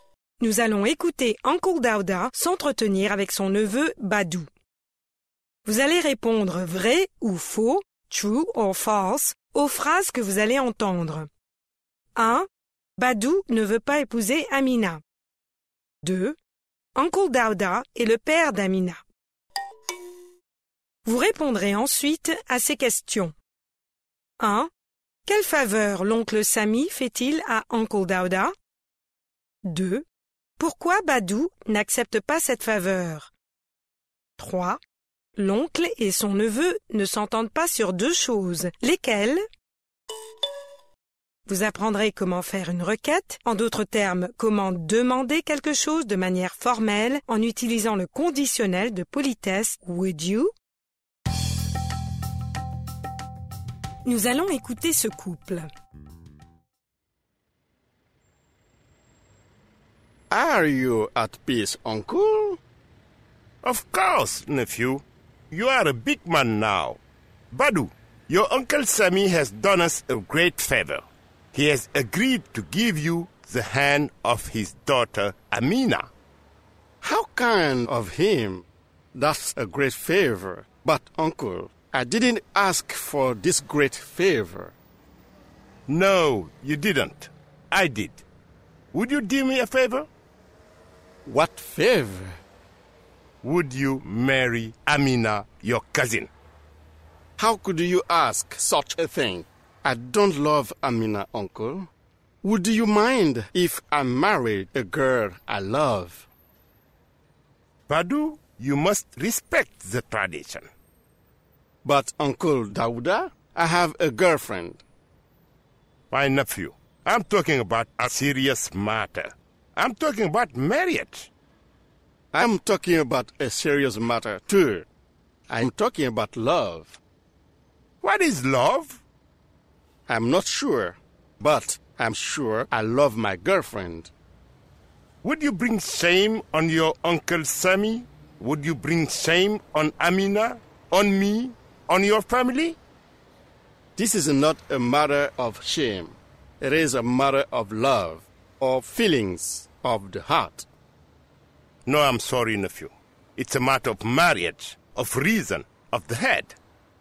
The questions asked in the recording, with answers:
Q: Badou ne veut pas épouser Amina.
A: L'énoncé 1 est vrai. Badou ne veut pas épouser Amina.

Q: Uncle Dauda est le père d'Amina.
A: L'énoncé 2 est faux.

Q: Quelle faveur l'oncle Sami fait-il à Uncle Dauda?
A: Il accepte d'accorder la main de sa fille à Badou.

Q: L'oncle et son neveu ne s'entendent pas sur deux choses. Lesquelles?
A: Sur le mariage et sur l'amour.